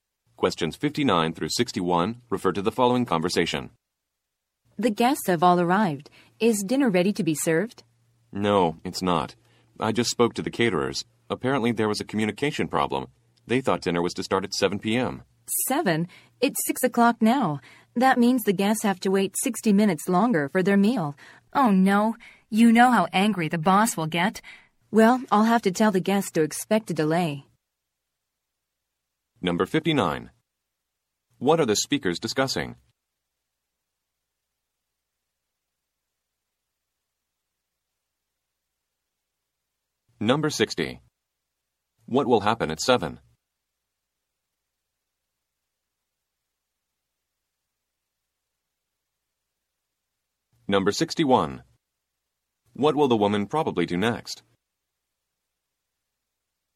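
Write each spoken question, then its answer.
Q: What are the speakers discussing?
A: A delay in serving dinner

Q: What will happen at 7?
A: Dinner will be served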